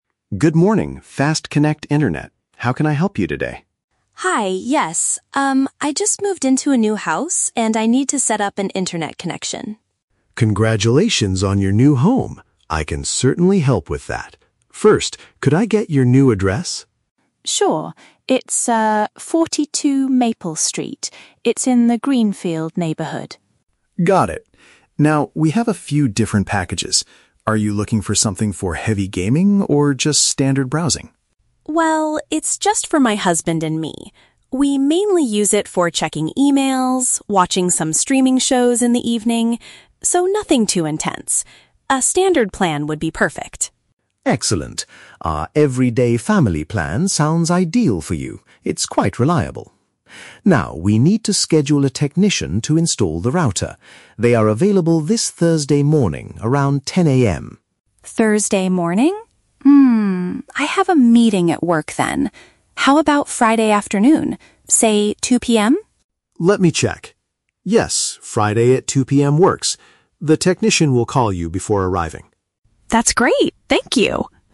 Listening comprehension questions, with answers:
Listen to the conversation and choose the correct answer (A, B, or C) for each question.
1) What kind of internet plan does the customer want?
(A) A high-speed plan for playing video games.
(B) A standard package for basic daily activities.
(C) A premium plan for a large family.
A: (B) A standard package for basic daily activities.

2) Why can't the customer accept the Thursday morning appointment?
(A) She has an appointment with the doctor.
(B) She has some work responsibilities to attend to.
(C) She will be moving into the house that day.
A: (B) She has some work responsibilities to attend to.

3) When will the technician come to set up the internet?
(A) Thursday at 10:00 AM.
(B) Friday at 10:00 AM.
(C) Friday at 2:00 PM.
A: (C) Friday at 2:00 PM.

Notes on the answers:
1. The customer says she and her husband only use the internet for "checking emails, watching some streaming shows" and want something "nothing too intense." Therefore, a standard package fits her needs. Why the traps are wrong: Option (A) is wrong because the agent mentions "heavy gaming", but the customer implies she doesn't need it. Option (C) is wrong because she only lives with her husband, not a large family.
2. The customer says, "I have a meeting at work then." Option (B) is a paraphrase of this reason. Why the traps are wrong: Option (A) is completely not mentioned. Option (C) is a distractor; she "just moved into a new house", but that is not the reason she rejects Thursday morning.
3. The customer suggests "Friday afternoon? Say, 2 PM?" and the agent confirms, "Yes, Friday at 2 PM works." Why the traps are wrong: Option (A) is the trap. Thursday at 10 AM was the agent's first suggestion, but it was rejected by the customer. Option (B) mixes up the days and times.

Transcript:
Agent: Good morning, FastConnect Internet. How can I help you today?
Customer: Hi, yes. Um, I just moved into a new house and I need to set up an internet connection.
Agent: Congratulations on your new home! I can certainly help with that. First, could I get your new address?
Customer: Sure, it's, ah, 42 Maple Street. It's in the Greenfield neighborhood.
Agent: Got it. Now, we have a few different packages. Are you looking for something for heavy gaming, or just standard browsing?
Customer: Well, it's just for my husband and me. We mainly use it for checking emails, watching some streaming shows in the evening... so, nothing too intense. A standard plan would be perfect.
Agent: Excellent. Our "Everyday Family" plan sounds ideal for you. It's quite reliable. Now, we need to schedule a technician to install the router. They are available this Thursday morning, around 10 AM.
Customer: Thursday morning? Hmm, I have a meeting at work then. How about Friday afternoon? Say, 2 PM?
Agent: Let me check... Yes, Friday at 2 PM works. The technician will call you before arriving.

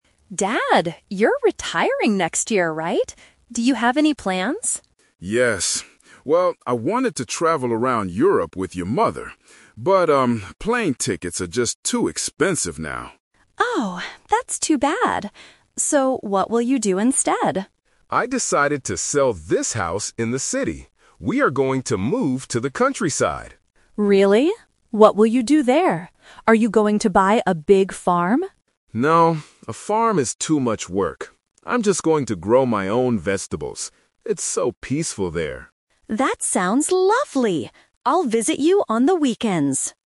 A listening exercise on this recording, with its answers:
Listen to the conversation between a father and his daughter. Choose the correct answer (A, B, or C) for each question.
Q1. Where is the father going to move after he retires?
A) To Europe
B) To the countryside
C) To another city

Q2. Why did the father decide NOT to travel?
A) He doesn't like flying.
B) He is too tired to travel.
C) It is too expensive.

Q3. What will the father do in the countryside?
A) Buy a big farm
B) Grow vegetables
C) Open a small shop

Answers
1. B) To the countryside
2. C) It is too expensive.
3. B) Grow vegetables

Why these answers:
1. The father mentions Europe first because he wanted to travel there (The Trap). However, he uses "But" to change his plan, stating he decided to move to the countryside. Moving to another city is plausible but not mentioned.
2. The father clearly states that "plane tickets are just too expensive now." Option B (too tired) is a trap because the word "too" is used, and he later mentions that a farm is "too much work," but he doesn't say he is too tired to travel. Option A (doesn't like flying) is not mentioned.
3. The daughter asks if he is going to buy a big farm (The Trap). The father rejects this idea by saying "No, a farm is too much work." Instead, his final decision is to "grow my own vegetables." Opening a small shop is not mentioned.

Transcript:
Daughter: Dad, you're retiring next year, right? Do you have any plans?
Father: Yes. Well, I wanted to travel around Europe with your mother. But, um, plane tickets are just too expensive now.
Daughter: Oh, that's too bad. So, what will you do instead?
Father: I decided to sell this house in the city. We are going to move to the countryside.
Daughter: Really? What will you do there? Are you going to buy a big farm?
Father: No, a farm is too much work. I'm just going to grow my own vegetables. It's so peaceful there.

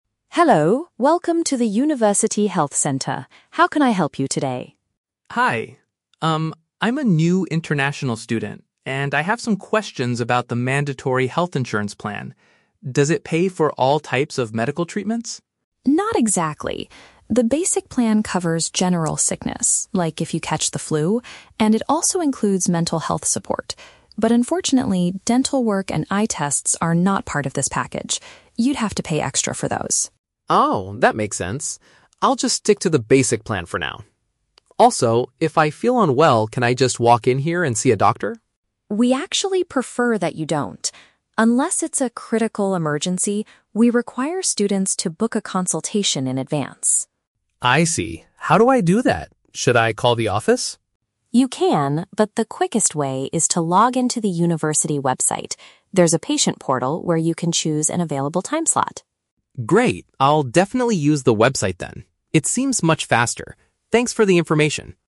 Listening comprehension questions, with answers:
Listen to the conversation between a new student and a university health center staff member. Read the questions below and choose the correct answer (A, B, or C) for each..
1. What medical services are excluded from the basic insurance package?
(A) Support for psychological issues.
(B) Services related to teeth and vision.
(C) Medication for serious sports injuries.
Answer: (B) Services related to teeth and vision.

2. What is the clinic's policy for regular medical visits?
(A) Patients must reserve a meeting time beforehand.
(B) Patients should arrive at the center without warning.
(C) Patients need to submit their health records first.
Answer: (A) Patients must reserve a meeting time beforehand.

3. How does the student decide to schedule his future appointments?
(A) By making a direct phone call to the office.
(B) By using the school's online patient platform.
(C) By sending a private email to the medical staff.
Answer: (B) By using the school's online patient platform.

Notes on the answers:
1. The staff explicitly states that "dental work and eye tests are not part of this package." (Paraphrased: dental work = teeth; eye tests = vision; not part of this package = excluded). The Trap: Option (A) is incorrect because the plan does include "mental health support" (psychological issues). Not mentioned: Option (C) is plausible for a student insurance policy, but sports injuries are never mentioned in the audio.
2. The staff tells the student that "we require students to book a consultation in advance." (Paraphrased: book a consultation = reserve a meeting time; in advance = beforehand). The Trap: Option (B) is the opposite of what is required. The student asks if he can just "walk in" (arrive without warning), but the staff says they "prefer that you don't" unless it is a critical emergency. Not mentioned: Option (C) is a standard medical procedure, but submitting health records is not discussed here.
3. The staff suggests logging into the "university website" where there is a "patient portal", and the student agrees, saying "I'll definitely use the website then." (Paraphrased: university website/portal = school's online platform). The Trap: Option (A) is incorrect. The student asks "Should I call the office?", and while the staff says he can, he ultimately decides the website is "much faster." Not mentioned: Option (C) is completely fabricated. Emailing the staff is not offered as an option.

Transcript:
Staff: Hello, welcome to the University Health Center. How can I help you today?
Student: Hi. Um, I'm a new international student, and I have some questions about the mandatory health insurance plan. Does it pay for all types of medical treatments?
Staff: Not exactly. The basic plan covers general sickness, like if you catch the flu, and it also includes mental health support. But unfortunately, dental work and eye tests are not part of this package. You'd have to pay extra for those.
Student: Oh, that makes sense. I'll just stick to the basic plan for now. Also, if I feel unwell, can I just walk in here and see a doctor?
Staff: We actually prefer that you don't. Unless it's a critical emergency, we require students to book a consultation in advance.
Student: I see. How do I do that? Should I call the office?
Staff: You can, but the quickest way is to log into the university website. There's a patient portal where you can choose an available time slot.
Student: Great, I'll definitely use the website then. It seems much faster. Thanks for the information!

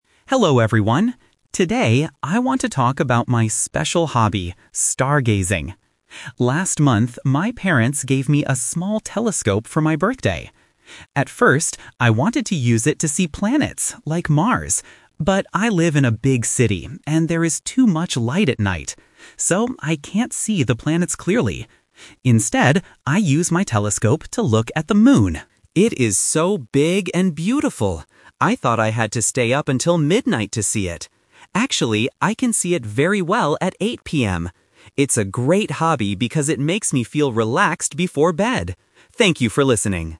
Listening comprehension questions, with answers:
Listen to a student talking about his hobby. Choose the correct answer (A, B, or C).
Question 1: What did the student want to see with the telescope at first?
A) The moon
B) The planets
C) The sun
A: B) The planets

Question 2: Why can't the student see the planets clearly?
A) Because the telescope is too small.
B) Because the weather is cloudy.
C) Because there is too much light in the city.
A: C) Because there is too much light in the city.

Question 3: What time does the student usually look at the moon?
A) At 8:00 PM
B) At midnight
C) Early in the morning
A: A) At 8:00 PM

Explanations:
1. The student says clearly: "At first, I wanted to use it to see planets, like Mars." Trap (The Twist): Option A (The moon) is the trap. The student looks at the moon now, but at first, they wanted to see the planets. Option C is not mentioned and is dangerous to do with a telescope!
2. The student explains the problem: "But I live in a big city, and there is too much light at night." Trap: Option A is a distractor. The student mentions having a "small telescope", but the reason they can't see the planets is the city light. Option B is a plausible guess for stargazing, but it is never mentioned.
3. The student confirms the actual time: "Actually, I can see it very well at 8 PM." Trap (The Twist): Option B (At midnight) is the trap. The student says they thought they had to stay up until midnight, but that was a wrong assumption. Option C is not mentioned.

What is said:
Student: Hello everyone. Today, I want to talk about my special hobby: stargazing. Last month, my parents gave me a small telescope for my birthday. At first, I wanted to use it to see planets, like Mars. But I live in a big city, and there is too much light at night. So, I can't see the planets clearly. Instead, I use my telescope to look at the moon. It is so big and beautiful! I thought I had to stay up until midnight to see it. Actually, I can see it very well at 8 PM. It's a great hobby because it makes me feel relaxed before bed. Thank you for listening.

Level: A2

